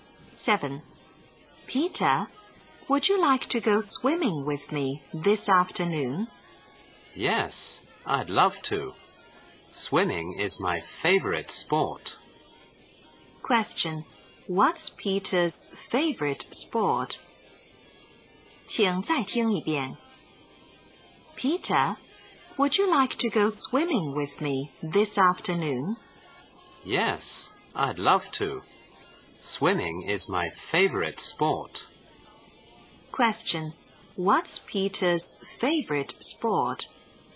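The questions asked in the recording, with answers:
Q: What's Peter's favorite sport?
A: Swimming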